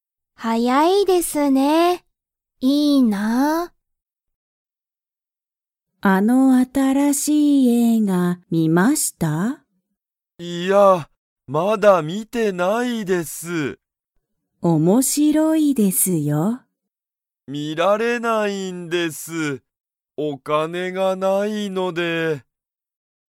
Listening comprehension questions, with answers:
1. 佐藤(さとう)さんは新(あたら)しい映画(えいが)を観(み)ましたか?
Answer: いいえ

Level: Level 1